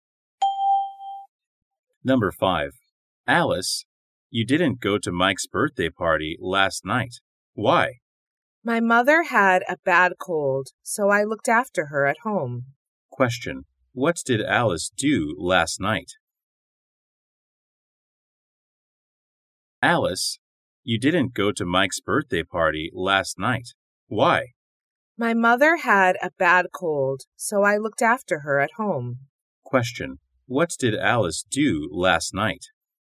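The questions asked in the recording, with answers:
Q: What did Alice do last night?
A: She looked after her mother at home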